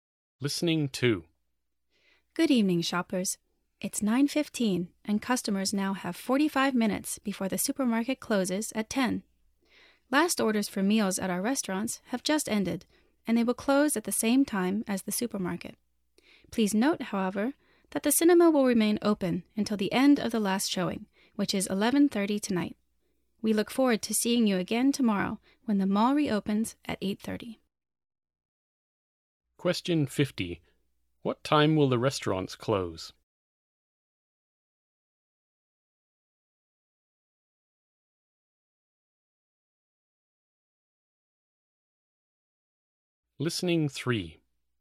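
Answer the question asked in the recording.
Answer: At 10 o'clock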